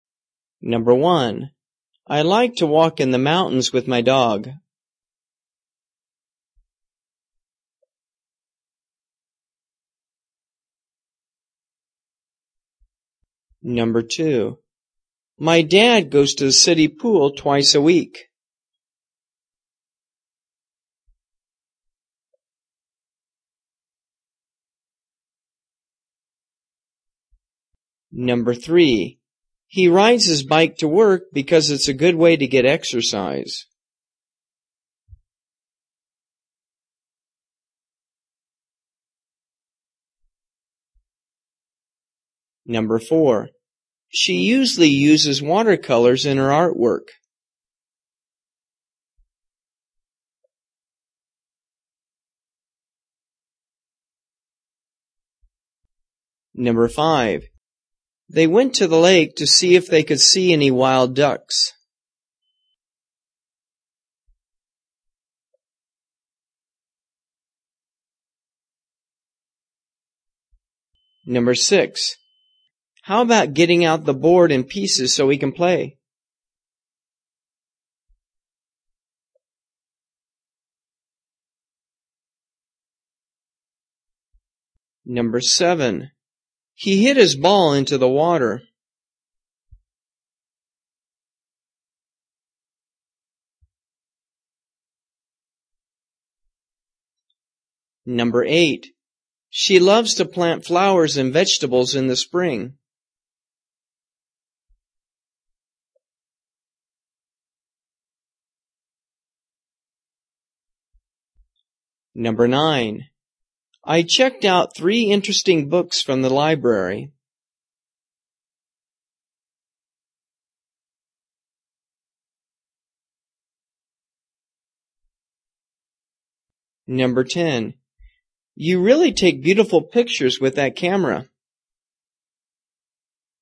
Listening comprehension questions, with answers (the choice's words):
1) I like to ____________ in the _________ with my ________.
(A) hiking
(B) running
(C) driving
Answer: hiking

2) My dad _______________ twice a week.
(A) weight lifting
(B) swimming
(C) basketball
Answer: swimming

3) He ____________________________________ to get exercise.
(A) bicycling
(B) soccer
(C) volleyball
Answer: bicycling

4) She usually uses ___________________________________.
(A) pottery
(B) knitting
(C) painting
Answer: painting

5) They went to the lake ______________________________.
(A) sailing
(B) bird watching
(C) fishing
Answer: bird watching

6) How about getting out the board _____________________?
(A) snowboarding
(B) skating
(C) chess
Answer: chess

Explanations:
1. I like to walk in the mountains with my dog.
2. My dad goes to the city pool twice a week.
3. He rides his bike to work because it is a good way to get exercise.
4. She usually uses watercolors in her artwork.
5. They went to the lake to see if they see any wild ducks.
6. How about getting out the board and pieces so we can play?

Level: 初级